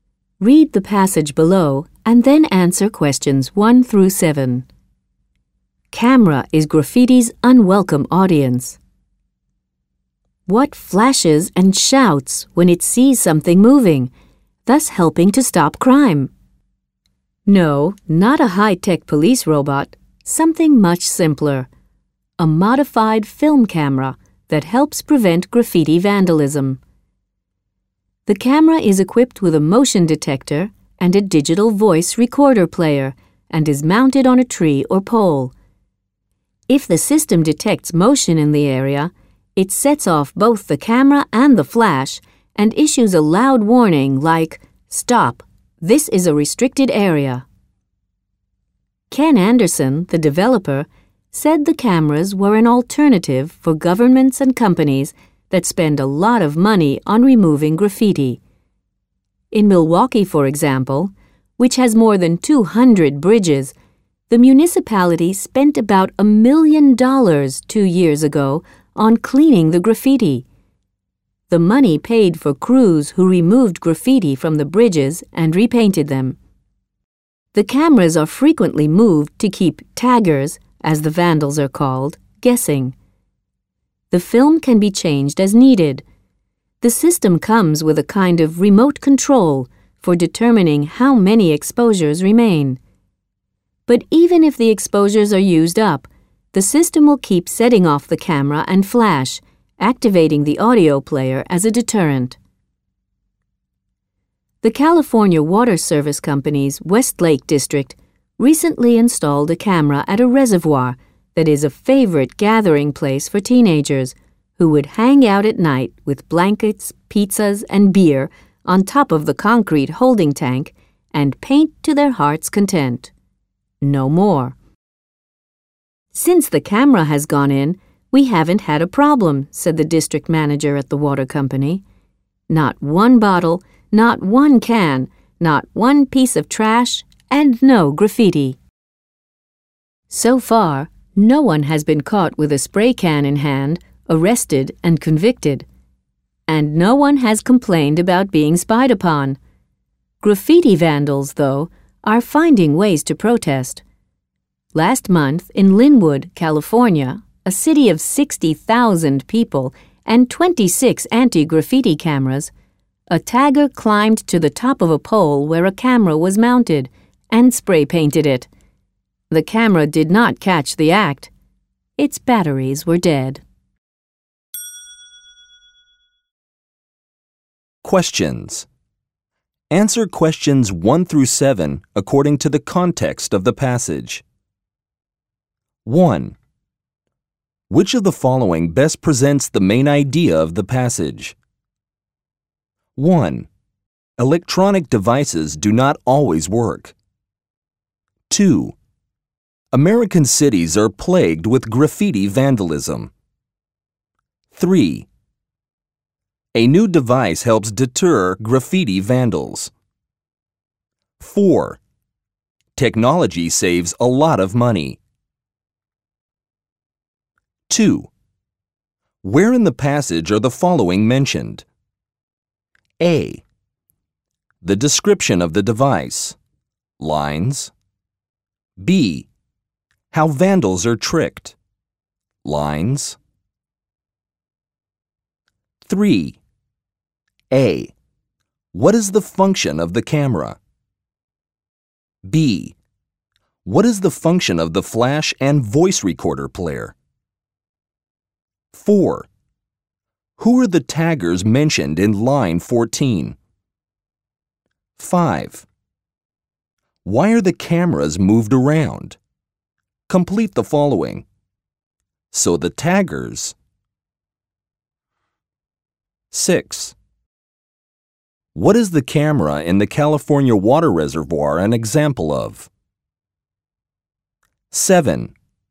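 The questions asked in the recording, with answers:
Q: Which of the following best presents the main idea of the passage?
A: 3: A new device helps deter graffiti vandals.

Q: What is the function of the flash and voice recorder player?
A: To warn and scare off vandals (a deterrent)

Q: Who are the taggers mentioned in line 14?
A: Graffiti vandals

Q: Why are the cameras moved around?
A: To keep the taggers guessing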